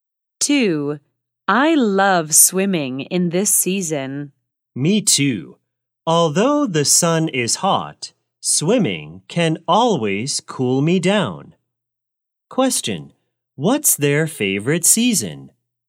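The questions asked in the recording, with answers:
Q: What's their favorite season?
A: Summer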